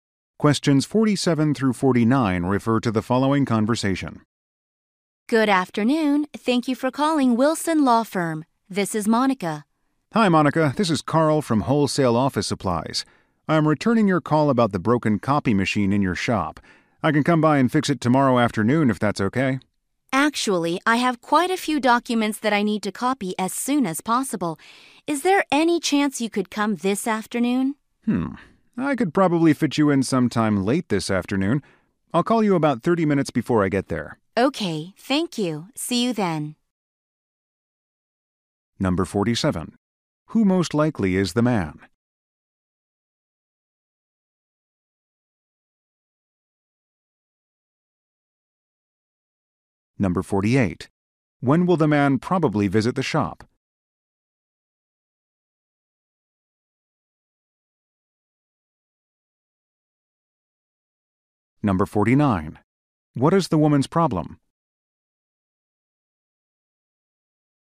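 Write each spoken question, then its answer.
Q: Who most likely is the man?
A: A copy machine repair technician

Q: When will the man probably visit the shop?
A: Late this afternoon

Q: What is the woman's problem?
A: The copy machine is broken and she has documents to copy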